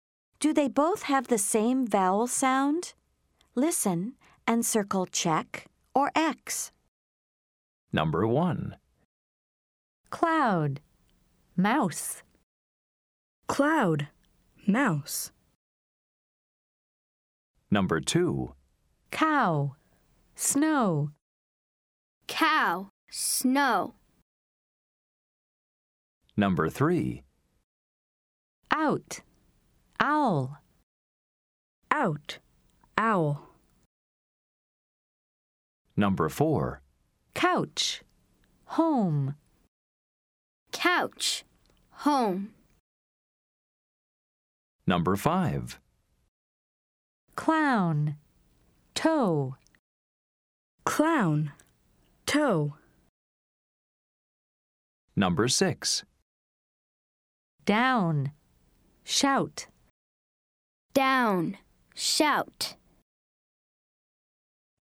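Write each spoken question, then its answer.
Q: Cloud. Mouse.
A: Yes (check): same vowel sound

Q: Cow. Snow.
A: No (X): different vowel sounds

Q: Out. Owl.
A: Yes (check): same vowel sound

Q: Couch. Home.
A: No (X): different vowel sounds

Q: Clown. Toe.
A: No (X): different vowel sounds

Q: Down. Shout.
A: Yes (check): same vowel sound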